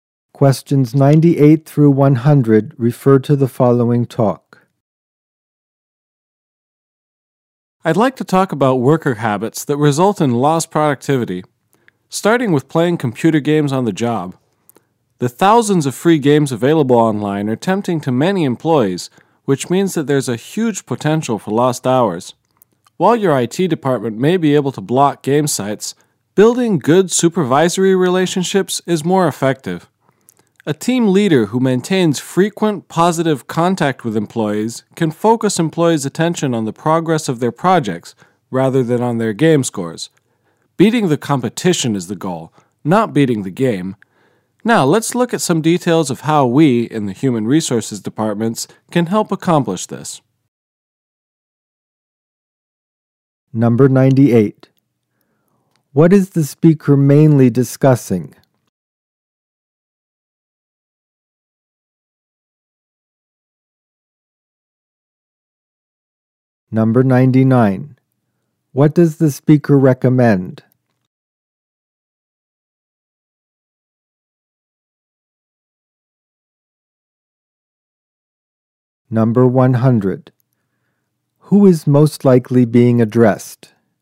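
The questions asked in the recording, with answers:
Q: What is the speaker mainly discussing?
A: Worker habits that cause lost productivity, like playing computer games at work

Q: What does the speaker recommend?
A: Building good supervisory relationships

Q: Who is most likely being addressed?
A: Human resources staff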